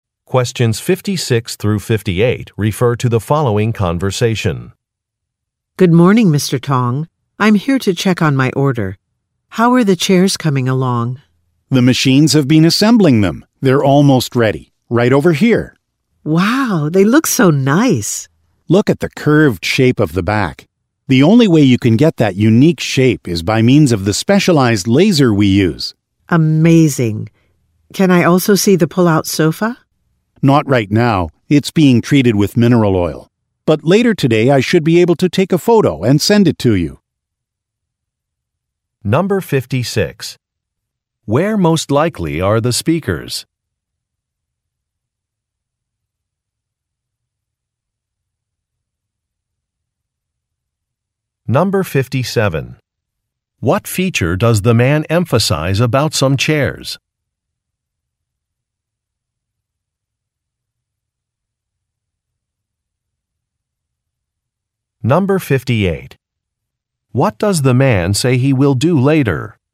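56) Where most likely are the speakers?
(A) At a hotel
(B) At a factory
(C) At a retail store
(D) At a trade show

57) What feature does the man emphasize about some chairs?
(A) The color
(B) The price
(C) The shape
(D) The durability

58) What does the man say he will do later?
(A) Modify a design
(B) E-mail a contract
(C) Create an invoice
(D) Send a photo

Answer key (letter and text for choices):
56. (B) At a factory
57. (C) The shape
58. (D) Send a photo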